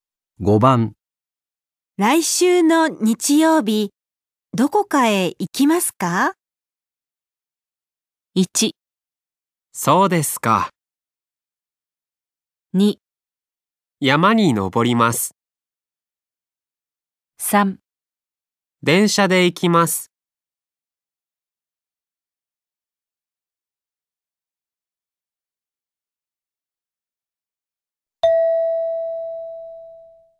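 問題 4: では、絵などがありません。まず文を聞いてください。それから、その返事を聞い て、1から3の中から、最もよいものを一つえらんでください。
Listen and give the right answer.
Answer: 山に登ります。

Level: N5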